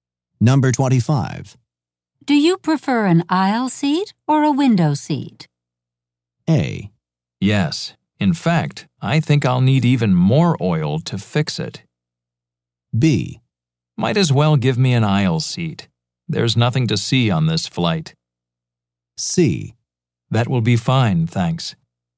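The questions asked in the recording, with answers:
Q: Do you prefer an aisle seat or a window seat?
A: B: Might as well give me an aisle seat. There's nothing to see on this flight.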